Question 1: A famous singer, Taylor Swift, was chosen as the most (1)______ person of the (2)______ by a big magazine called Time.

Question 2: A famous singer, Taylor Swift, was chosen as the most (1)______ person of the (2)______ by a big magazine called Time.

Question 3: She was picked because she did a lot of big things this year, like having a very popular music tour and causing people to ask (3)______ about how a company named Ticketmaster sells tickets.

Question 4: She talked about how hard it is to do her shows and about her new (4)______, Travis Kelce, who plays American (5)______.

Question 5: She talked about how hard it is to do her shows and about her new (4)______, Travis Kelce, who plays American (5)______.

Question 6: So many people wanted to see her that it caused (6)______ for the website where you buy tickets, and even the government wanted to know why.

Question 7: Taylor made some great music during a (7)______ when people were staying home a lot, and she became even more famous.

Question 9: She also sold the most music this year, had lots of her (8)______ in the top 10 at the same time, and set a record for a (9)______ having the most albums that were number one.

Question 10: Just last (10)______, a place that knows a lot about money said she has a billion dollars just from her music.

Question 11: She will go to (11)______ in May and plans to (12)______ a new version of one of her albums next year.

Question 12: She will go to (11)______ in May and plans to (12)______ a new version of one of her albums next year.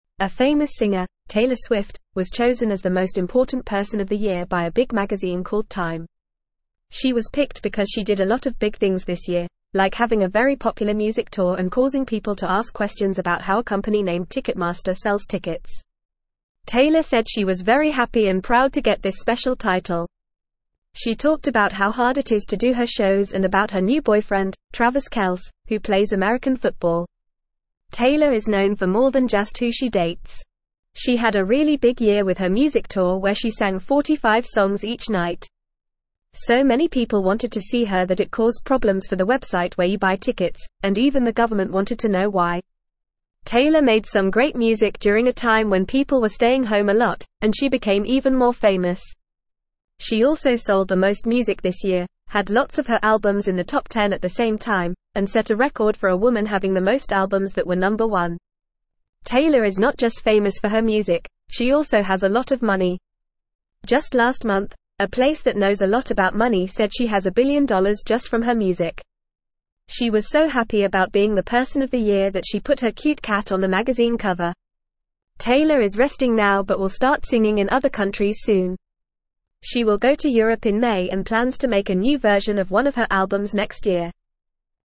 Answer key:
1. important
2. year
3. questions
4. boyfriend
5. football
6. problems
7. time
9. woman
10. month
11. Europe
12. make

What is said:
A famous singer, Taylor Swift, was chosen as the most important person of the year by a big magazine called Time. She was picked because she did a lot of big things this year, like having a very popular music tour and causing people to ask questions about how a company named Ticketmaster sells tickets. Taylor said she was very happy and proud to get this special title. She talked about how hard it is to do her shows and about her new boyfriend, Travis Kelce, who plays American football.
Taylor is known for more than just who she dates. She had a really big year with her music tour where she sang 45 songs each night. So many people wanted to see her that it caused problems for the website where you buy tickets, and even the government wanted to know why. Taylor made some great music during a time when people were staying home a lot, and she became even more famous. She also sold the most music this year, had lots of her albums in the top 10 at the same time, and set a record for a woman having the most albums that were number one.
Taylor is not just famous for her music; she also has a lot of money. Just last month, a place that knows a lot about money said she has a billion dollars just from her music. She was so happy about being the person of the year that she put her cute cat on the magazine cover. Taylor is resting now but will start singing in other countries soon. She will go to Europe in May and plans to make a new version of one of her albums next year.

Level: Level 2